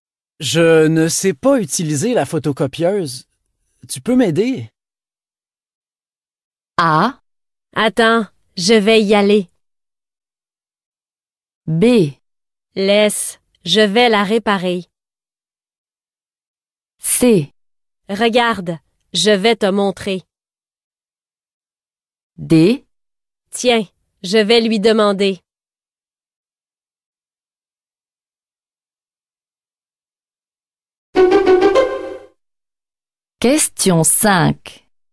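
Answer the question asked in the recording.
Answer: Regarde, je vais te montrer.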